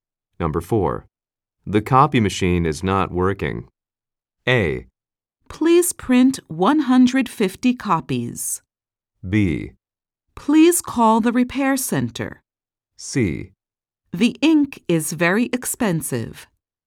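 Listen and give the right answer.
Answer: B: Please call the repair center.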